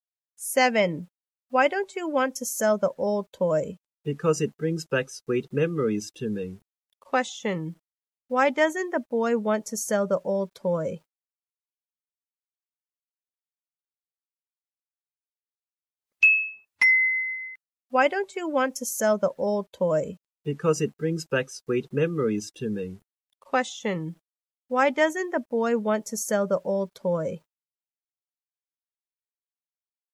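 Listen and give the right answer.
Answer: Because it brings back sweet memories to him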